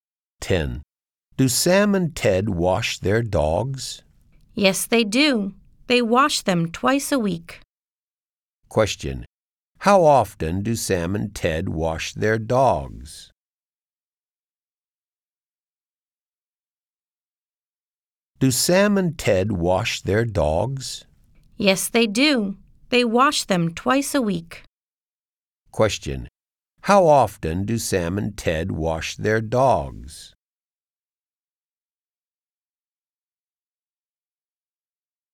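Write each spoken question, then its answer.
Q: How often do Sam and Ted wash their dogs?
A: Twice a week.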